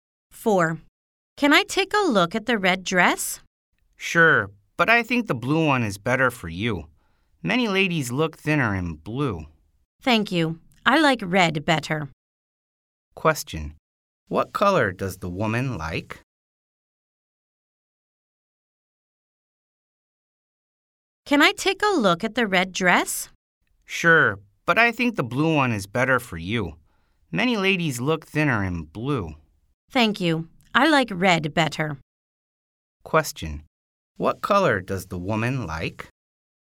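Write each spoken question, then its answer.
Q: What color does the woman like?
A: Red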